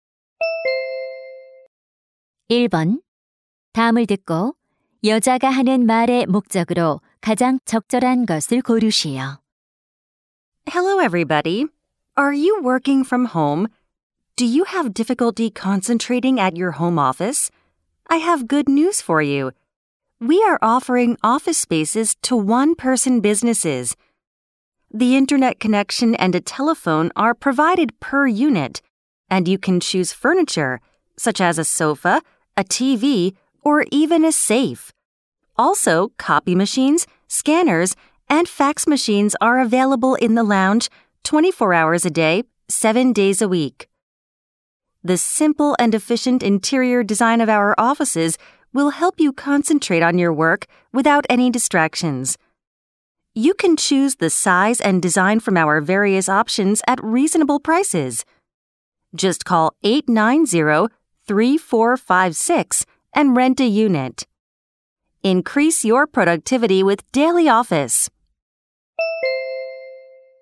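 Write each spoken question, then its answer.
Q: 다음을 듣고 여자가 하는 말의 목적으로 가장 적절한 것을 고르시오.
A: 1인 사업자용 사무실 임대를 광고하려고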